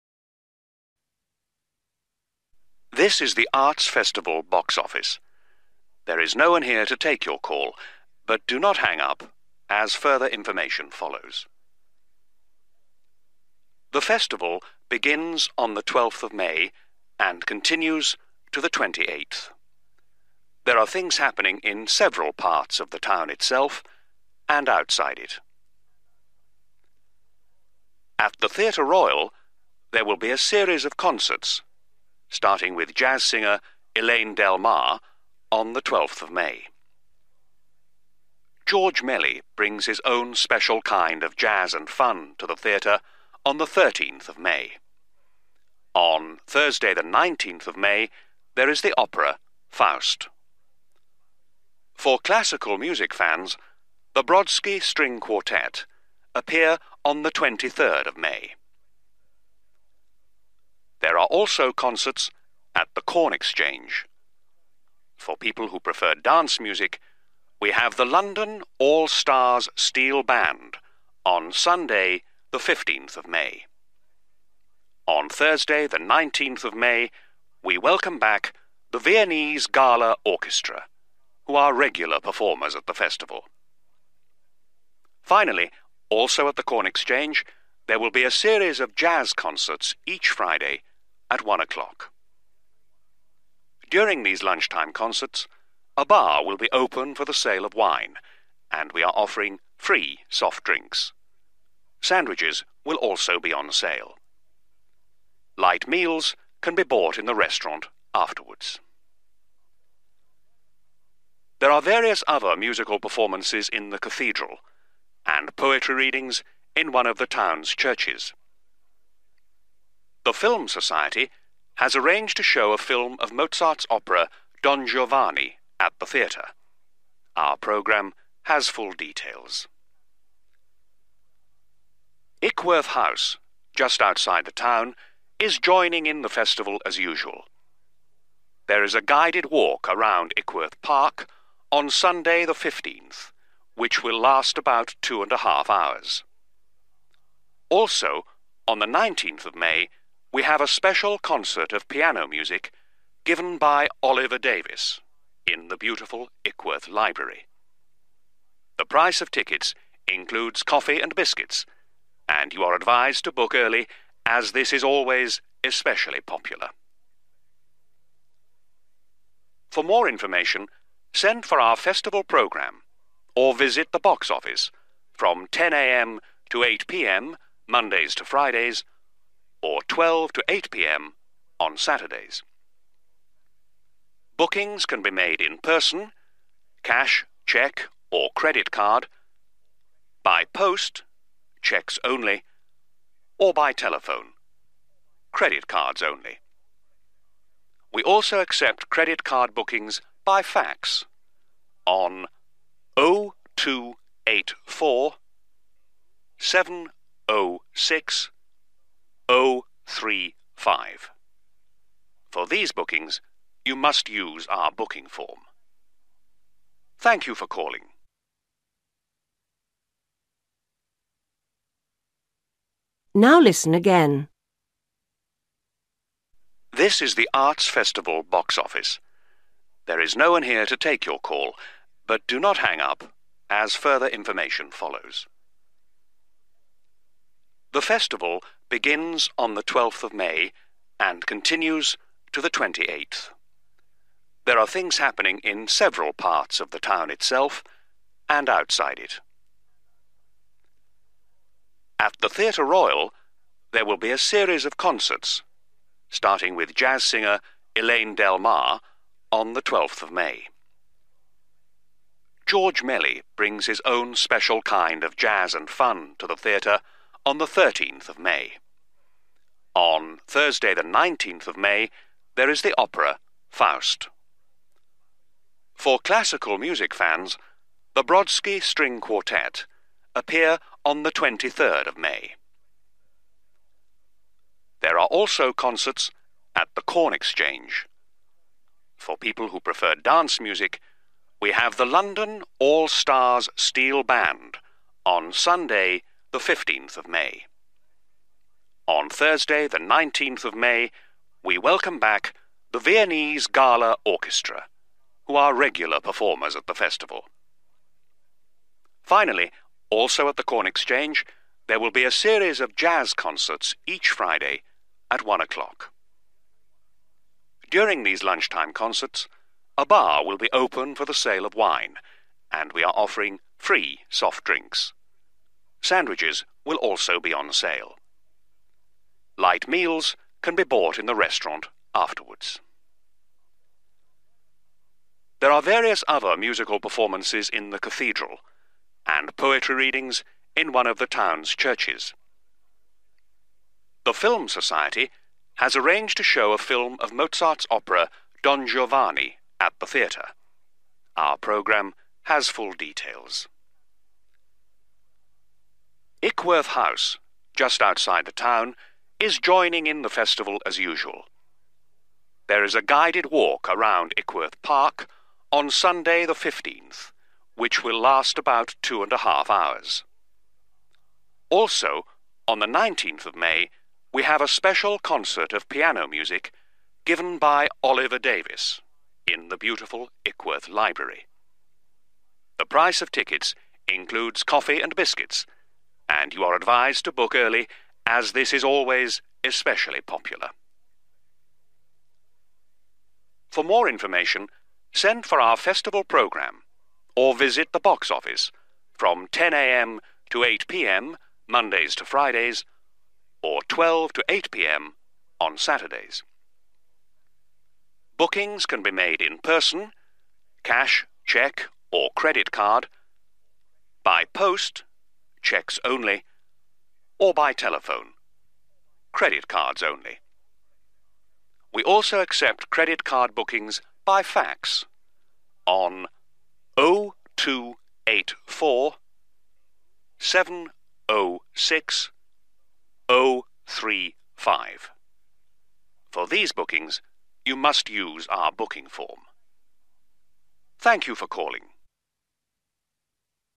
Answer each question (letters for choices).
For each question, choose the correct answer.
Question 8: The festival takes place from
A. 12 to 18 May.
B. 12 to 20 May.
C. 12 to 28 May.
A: C

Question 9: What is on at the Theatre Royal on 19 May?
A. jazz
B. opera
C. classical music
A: B

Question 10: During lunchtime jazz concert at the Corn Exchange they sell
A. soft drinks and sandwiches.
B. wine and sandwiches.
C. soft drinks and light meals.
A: B

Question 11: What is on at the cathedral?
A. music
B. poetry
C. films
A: A

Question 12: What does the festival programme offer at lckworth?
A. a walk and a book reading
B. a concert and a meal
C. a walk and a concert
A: C

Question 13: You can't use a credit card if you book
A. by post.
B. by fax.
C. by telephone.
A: A

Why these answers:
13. Bookings can be made in person (cash, cheque or credit card), by post (cheques only), or by telephone (credit cards only). We also accept credit card bookings by fax, on 0284 706035.

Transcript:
Message: This is the Arts Festival Box Office. There is no one here to take your call, but do not hang up, as further information follows.
The Festival begins on the 12th of May and continues to the 28th. There are things happening in several parts of the town itself, and outside it.
At the Theatre Royal, there will be a series of concerts, starting with jazz singer Elaine Delmar on the 12th of May. George Melly brings his own special kind of jazz and fun to the theatre on the 13th of May. On Thursday the 19th of May, there is the opera Faust. For classical music fans, the Brodsky String Quartet appear on the 23rd of May.
There are also concerts at the Corn Exchange. For people who prefer dance music, we have the London All Stars Steel Band on Sunday the 15th of May. On Thursday the 19th of May we welcome back the Viennese Gala Orchestra, who are regular performers at the Festival. Finally, also at the Corn Exchange, there will be a series of jazz concerts each Friday at 1 o'clock. During these lunch-time concerts a bar will be open for the sale of wine and we are offering free sort drinks. Sandwiches will also be on sale. Light meals can be bought in the restaurant afterwards.
There are various other musical performances in the cathedral, and poetry readings in one of the town's churches. The Film Society has arranged to show a film of Mozart's opera Don Giovanni at the theatre. Our programme has full details.
Ickworth House, just outside the town is joining in the Festival as usual. There is a guided walk around Ickworth Park on Sunday the 15th, which will last about two and a half hours. Also, on the 19th of May, we have a special concert of piano music, given by Oliver Davies in the beautiful Ickworth Library. The price of tickets includes coffee and biscuits and you are advised to book early, as this is always especially popular.
For more information, send for our Festival programme or visit the Box Office from 10.00 a.m. to 8 p.m. Mondays to Fridays, or 12.00 to 8 p.m. on Saturdays. Bookings can be made in person (cash, cheque or credit card), by post (cheques only), or by telephone (credit cards only). We also accept credit card bookings by fax, on 0284 706035. For these bookings, you must use our booking form.
Thank you for calling.

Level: B1